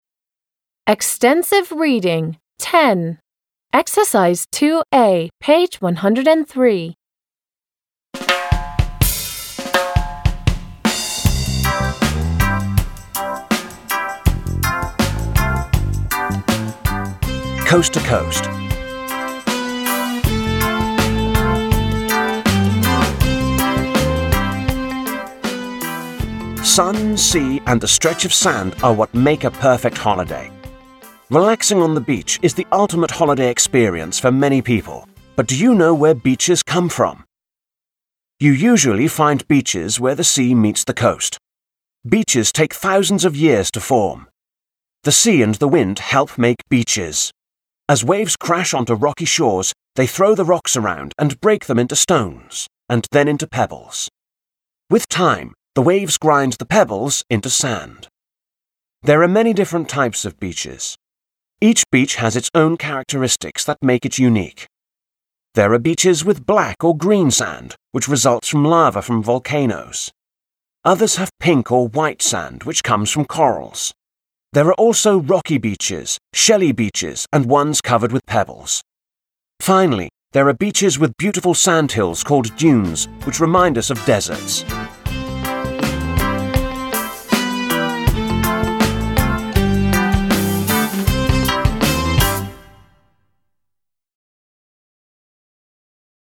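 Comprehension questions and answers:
2. a) What forms a beach? Read, listen and find out.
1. What forms a beach?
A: The sea and the wind (waves break rocks into stones, pebbles and then sand).

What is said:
Relaxing on the beach is the ultimate holiday experience for many people but do you know where beaches come from? You usually find beaches where the sea meets the coasts. Beaches take thousands of years to form. The sea and the wind help make beaches. As waves crash into rocky shores, they throw the rocks around and break them into stones and then into pebbles. With time, the waves grind the pebbles into sand. There are many different types of beaches. Each beach has its own characteristics that make it unique. There are beaches with black or green sand, which results from lava from volcanoes. Others have pink or white sand which comes from corals. There are also rocky beaches, shelly beaches and ones covered with pebbles. 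Finally there are beaches with beautiful sand hills called dunes which remind us of deserts.

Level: 6 класс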